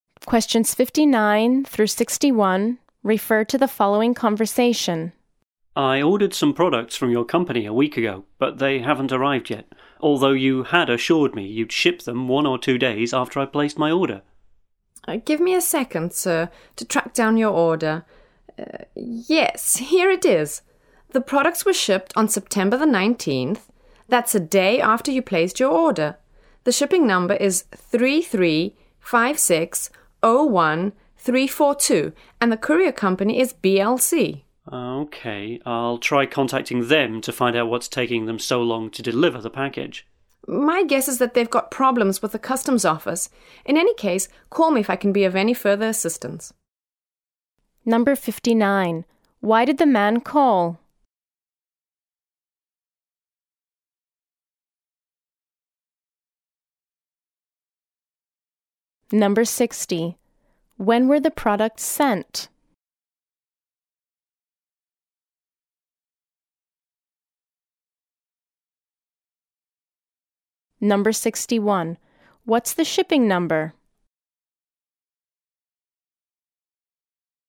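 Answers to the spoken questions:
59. His ordered products haven't arrived yet
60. On September 19th
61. 335601342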